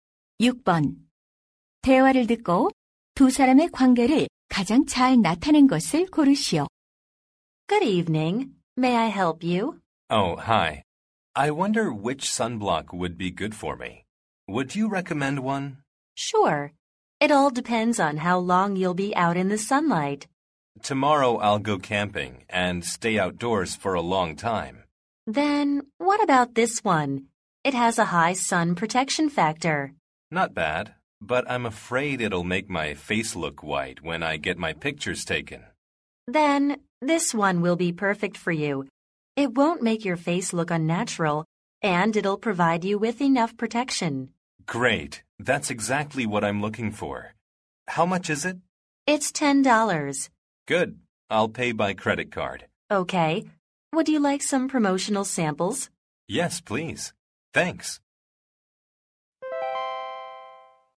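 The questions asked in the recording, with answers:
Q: 대화를 듣고 두 사람의 관계를 가장 잘 나타낸 것을 고르시오.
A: 화장품 가게 점원과 손님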